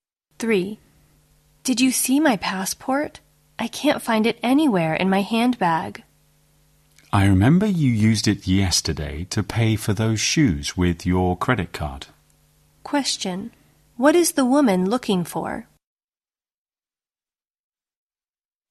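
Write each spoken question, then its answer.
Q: What is the woman looking for?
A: Her passport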